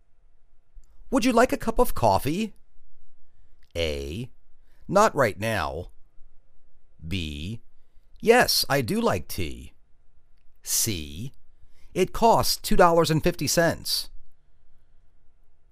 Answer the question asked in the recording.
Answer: Not right now.